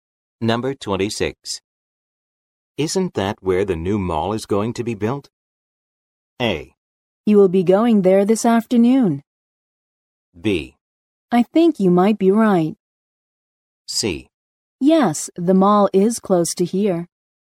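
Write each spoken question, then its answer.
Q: Isn't that where the new mall is going to be built?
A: B: I think you might be right.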